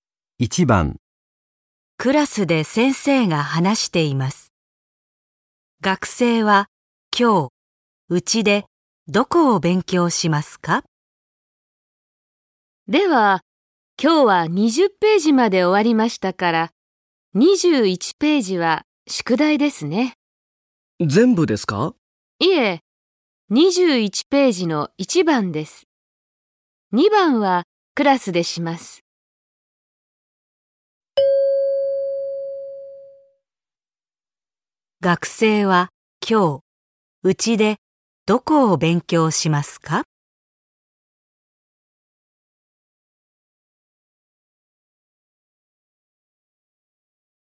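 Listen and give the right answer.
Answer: 21ページの1番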